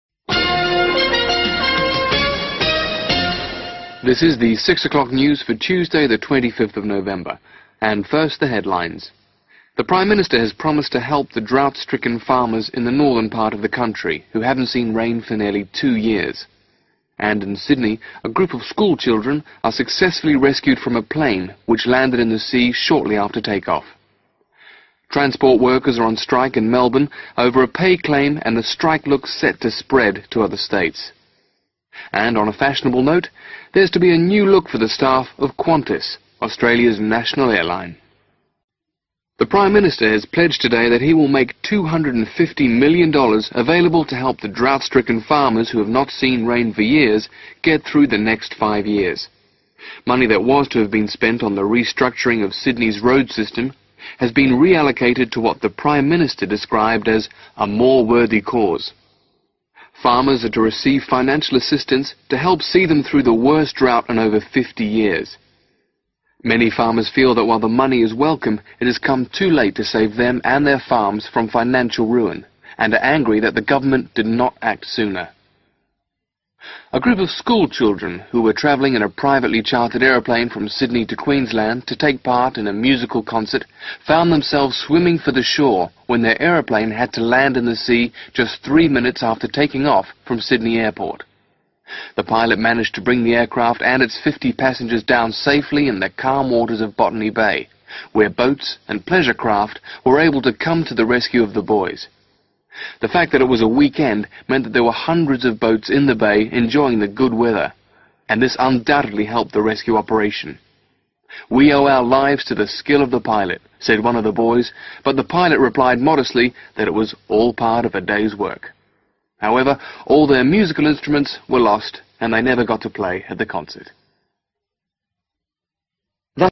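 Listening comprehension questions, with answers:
Complete the notes below by writing NO MORE THAN THREE WORDS in the spaces provided.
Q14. The Government plans to give (14) $ ............................................. to assist the farmers.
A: 250 million

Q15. This money was to be spent on improving Sydney's (15) ................................................ but has now been re-allocated.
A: road system

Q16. Farmers say that the money will not help them because it is (16) .......................................................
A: too late

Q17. An aeroplane which was carrying a group of (17) ......................... was forced to land just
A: school children

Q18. was forced to land just (18) ............. minutes after take-off.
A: 3

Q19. The passengers were rescued by (19) .......................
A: boats and pleasure craft

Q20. The passengers thanked the (20) ................... 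for saving their lives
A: pilot

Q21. but unfortunately, they lost their (21) ........................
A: musical instruments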